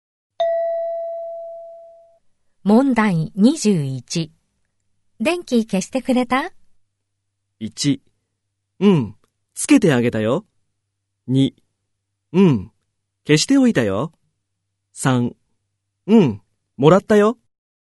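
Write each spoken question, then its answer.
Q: 電気消してくれた?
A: 2: うん、消しておいたよ。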